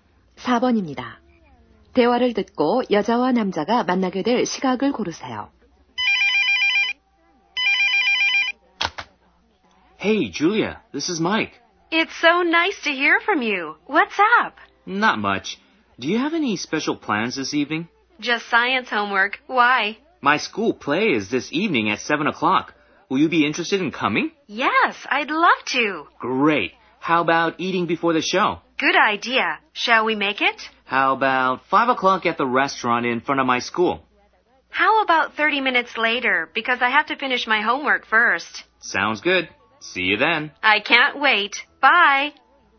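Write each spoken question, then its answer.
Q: 대화를 듣고 여자와 남자가 만나게 될 시각을 고르세요.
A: 5시 30분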